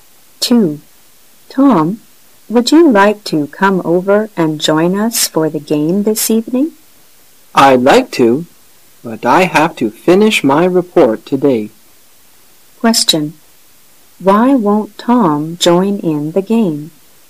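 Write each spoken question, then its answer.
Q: Why won't Tom join in the game?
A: He has to finish his report today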